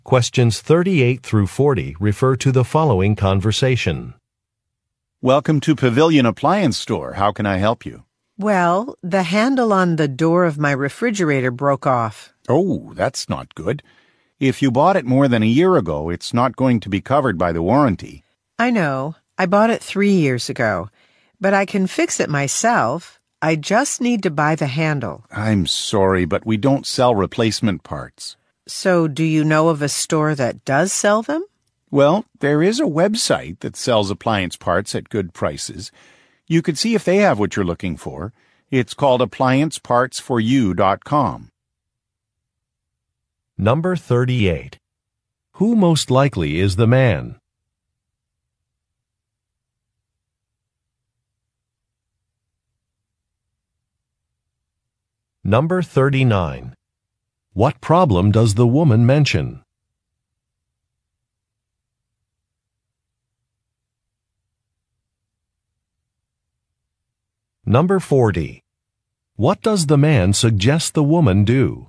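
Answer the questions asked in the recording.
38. A store employee at an appliance store
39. The handle on her refrigerator door broke off
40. Look for the part on an appliance parts website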